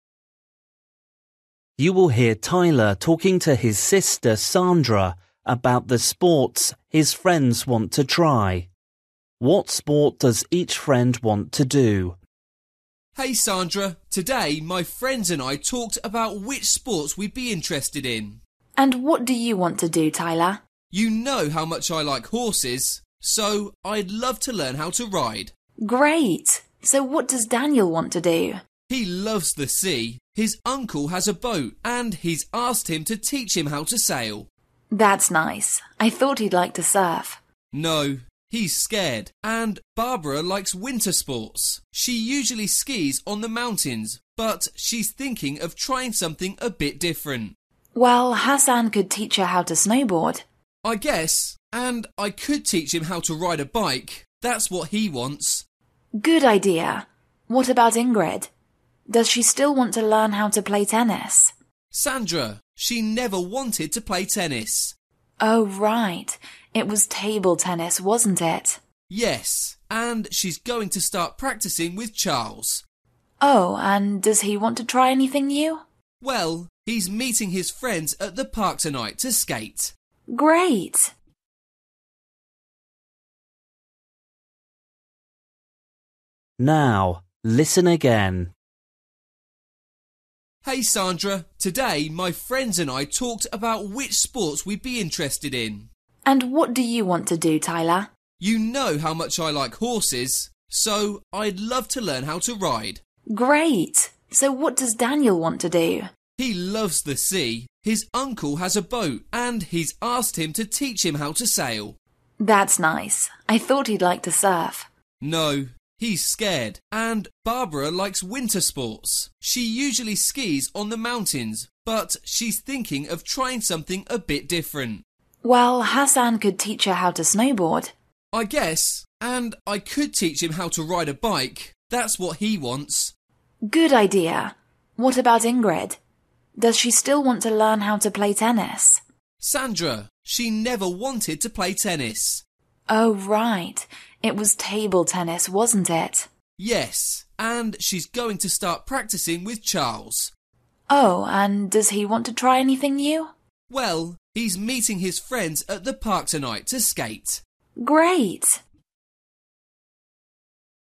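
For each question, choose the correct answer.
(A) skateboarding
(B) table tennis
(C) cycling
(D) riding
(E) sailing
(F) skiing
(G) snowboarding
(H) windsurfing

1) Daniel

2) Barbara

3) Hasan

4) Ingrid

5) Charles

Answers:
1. (E) sailing
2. (G) snowboarding
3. (C) cycling
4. (B) table tennis
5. (A) skateboarding

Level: Luyện nghe trình độ A2

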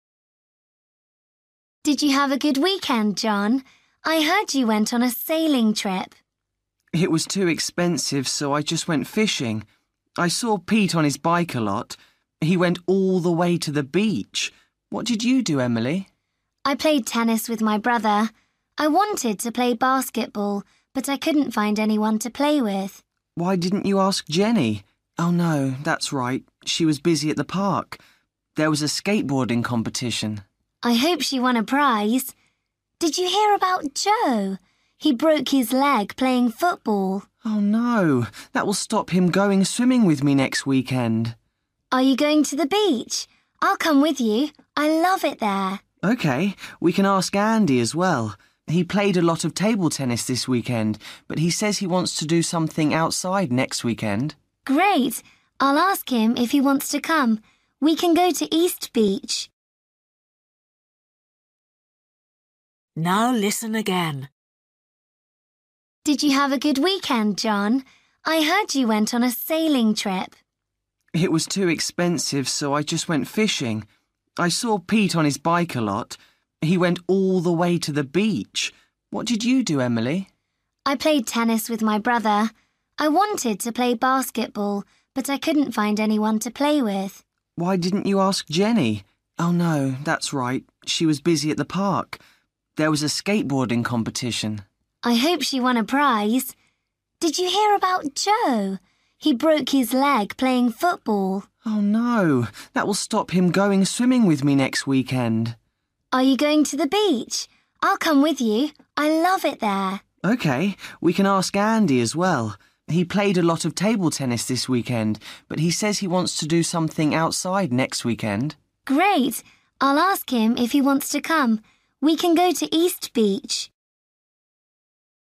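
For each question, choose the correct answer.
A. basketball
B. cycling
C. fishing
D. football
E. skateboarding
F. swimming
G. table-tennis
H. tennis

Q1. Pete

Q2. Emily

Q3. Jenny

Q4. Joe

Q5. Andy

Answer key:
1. B. cycling
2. H. tennis
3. E. skateboarding
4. D. football
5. G. table-tennis

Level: Luyện nghe trình độ A2

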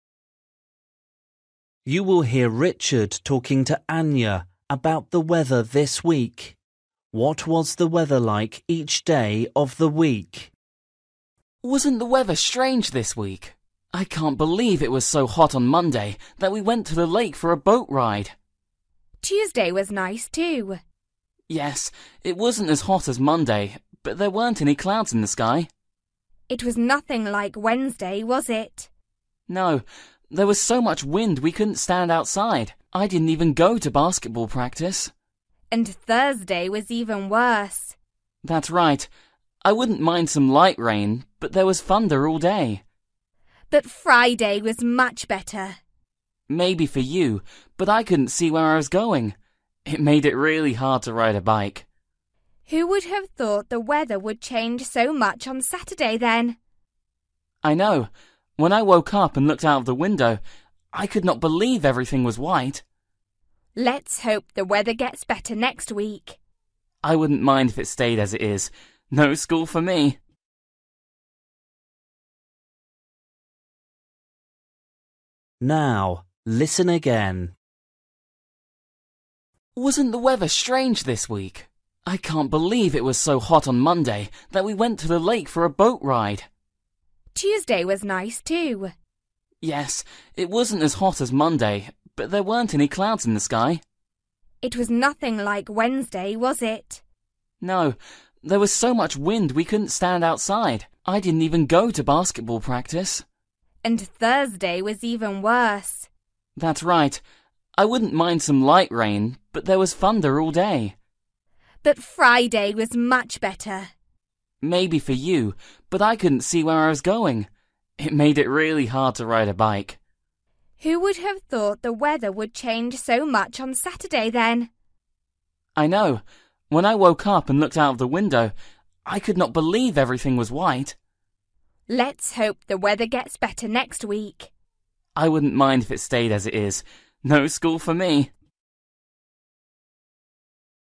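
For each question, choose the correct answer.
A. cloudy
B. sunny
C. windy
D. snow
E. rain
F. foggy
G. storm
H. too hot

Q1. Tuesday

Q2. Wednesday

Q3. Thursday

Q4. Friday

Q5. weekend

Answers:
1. B. sunny
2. C. windy
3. G. storm
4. F. foggy
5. D. snow

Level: Luyện nghe trình độ A2

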